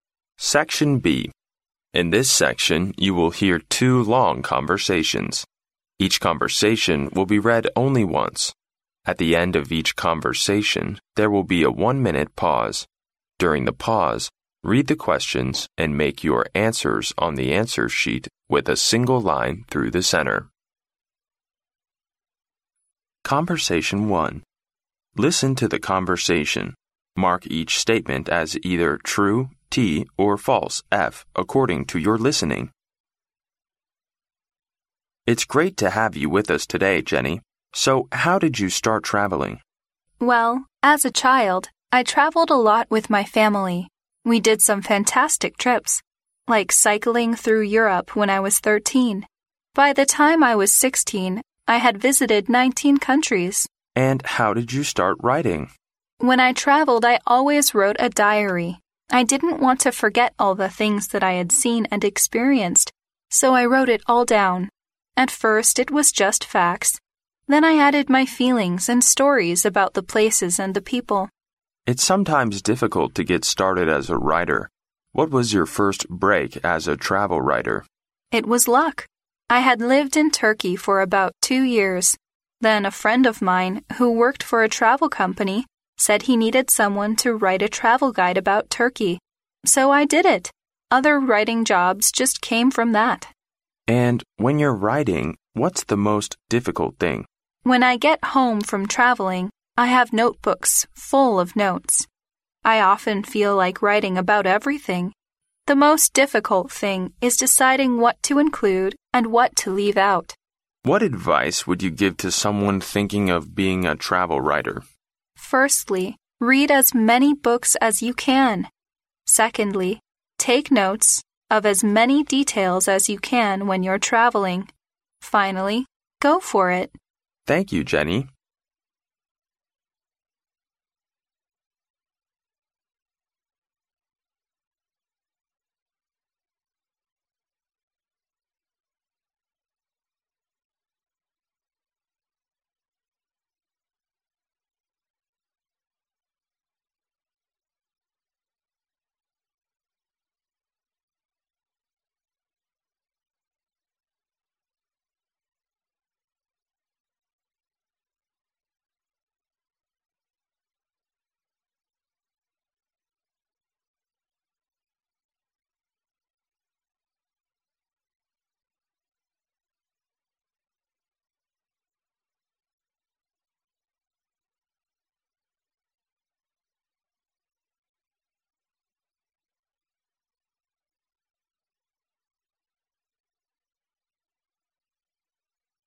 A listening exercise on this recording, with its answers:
Listen to the conversation, and mark each statement as either true (T) or false (F) according to your listening.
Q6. Cycling through Europe was considered to be one of Jenny's fantastic trips.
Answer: T

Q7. When Jenny first wrote a travel diary, she always mixed facts with her feelings about the places and the people.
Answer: F

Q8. One of Jenny's friends who worked for a travel company is crucial to her becoming a travel writer.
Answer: T

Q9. When travelling back with notebooks full of notes, Jenny finds it difficult to decide what to include and what to leave out.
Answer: T

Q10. Jenny advises people who want to work as a travel writer to travel as much as possible.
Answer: F

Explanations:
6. 录音中Jenny提到"We did some fantastic trips, like cycling through Europe..."由此可知Jenny认为骑行穿越欧洲是一场十分精彩的旅行。故该判断正确。
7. 录音中Jenny提到"At first, it was just facts."由此可知最开始写旅行日记时,Jenny只记录事实,并不融入情感。故该判断错误。
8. 录音中采访者问起Jenny作为旅行作家的第一个突破时,Jenny提到一个在旅游公司工作的朋友让她写土耳其旅行指南。由此可知这个朋友给她成为旅行作家这件事带来了突破,起到了关键作用。故该判断正确。
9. 录音中Jenny提到旅行归来时她的笔记本总是记得满满的,而写作时"The most difficult thing is deciding what to include and what to leave out."由此可知Jenny很难决定在写作时写下什么内容、省略什么内容。故该判断正确。
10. 录音中Jenny对想要成为旅行作家的人提了三点建议:尽量多阅读;旅行时尽量多记细节;努力争取。但她没有提到要尽可能多地去旅游。故该判断错误。

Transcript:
M: It's great to have you with us today, Jenny. So, how did you start travelling?
W: Well, as a child, I travelled a lot with my family. We did some fantastic trips, like cycling through Europe, when I was 13. By the time I was 16 I had visited 19 countries!
W: When I travelled I always wrote a diary. I didn't want to forget all the things that I had seen and experienced. So I wrote it all down. At first, it was just facts. Then I added my feelings and stories about the places and the people.
M: It's sometimes difficult to get started as a writer. What was your first "break" as a travel writer?
W: It was luck. I had lived in Turkey for about two years. Then a friend of mine, who worked for a travel company, said he needed someone to write a travel guide about Turkey. So I did it! Other writing jobs just came from that.
M: And when you're writing, what's the most difficult thing?
W: When I get home from travelling, I have notebooks full of notes. I often feel like writing about everything. The most difficult thing is deciding what to include and what to leave out.
M: What advice would you give to someone thinking of being a travel writer?
W: Firstly, read as many books as you can. Secondly, take notes of as many details as you can when you're travelling. Finally, go for it!
M: Thank you, Jenny.